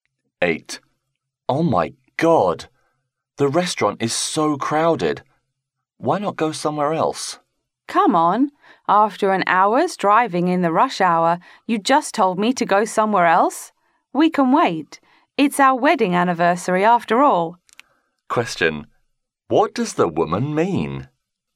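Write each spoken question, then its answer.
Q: What does the woman mean?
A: She wants to wait at this restaurant rather than go somewhere else.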